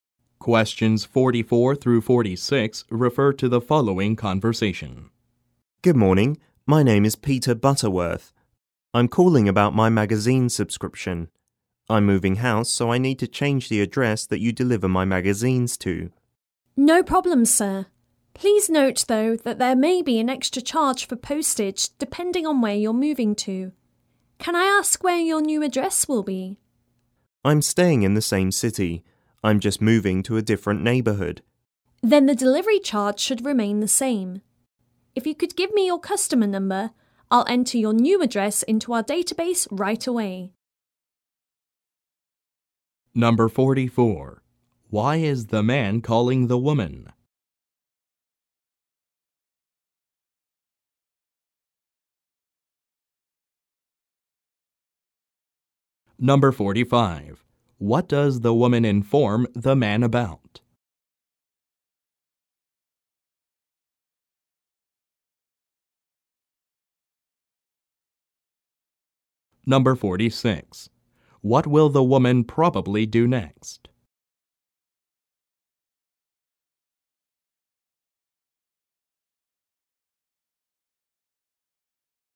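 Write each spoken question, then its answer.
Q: Why is the man calling the woman?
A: To change the delivery address for his magazine subscription

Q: What does the woman inform the man about?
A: A possible extra postage charge

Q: What will the woman probably do next?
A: Enter his new address into the database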